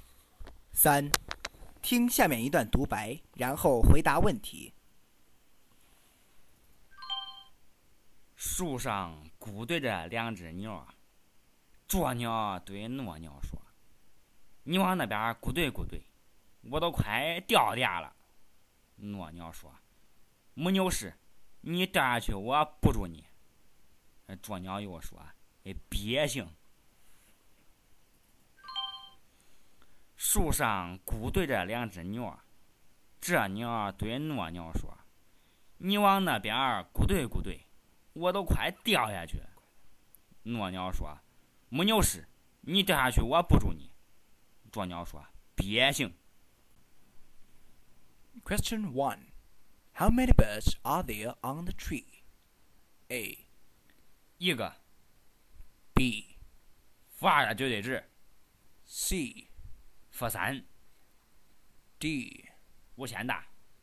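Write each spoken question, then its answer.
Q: How many birds are there on the tree?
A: B: 负二的绝对值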